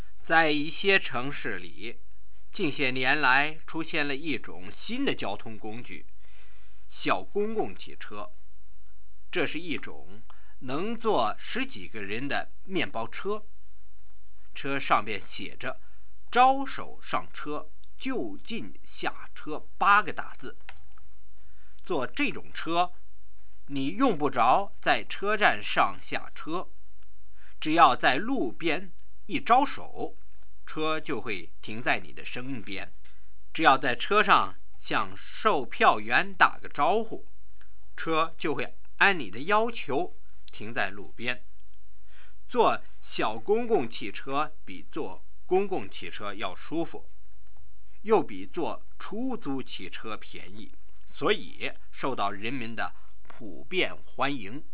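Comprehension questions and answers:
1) Describe the meaning of "zhao shou shang che, jiu jin xia che".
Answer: Wave by the roadside and the minibus stops to pick you up; tell the conductor and it stops by the road where you want to get off.

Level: 2nd Year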